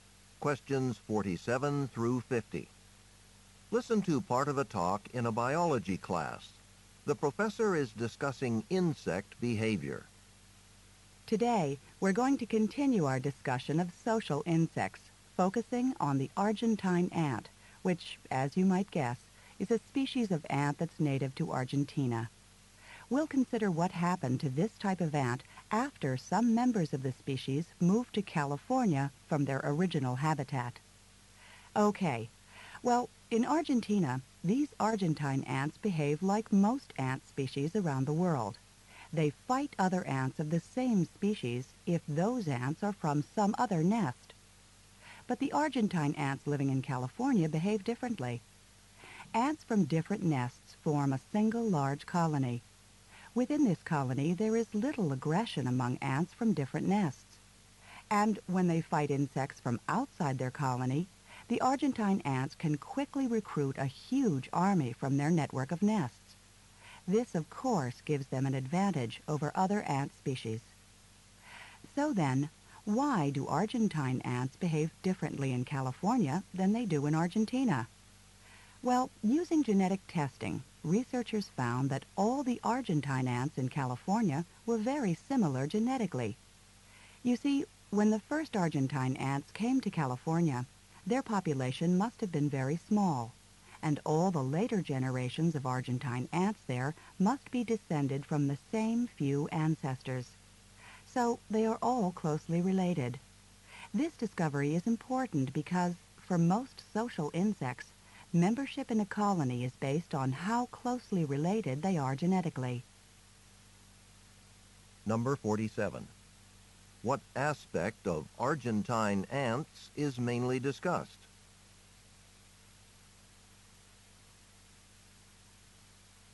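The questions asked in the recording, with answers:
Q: What aspect of Argentine ants is mainly discussed?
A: Their different social behavior in California compared with Argentina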